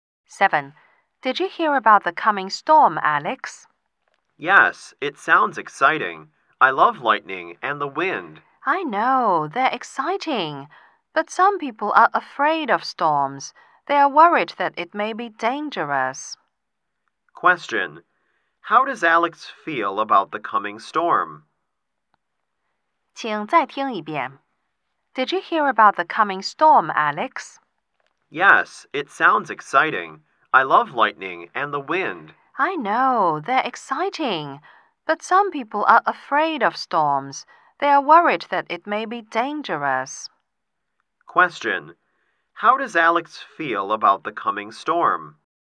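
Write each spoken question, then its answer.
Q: Question. How does Alex feel about the coming storm?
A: Excited.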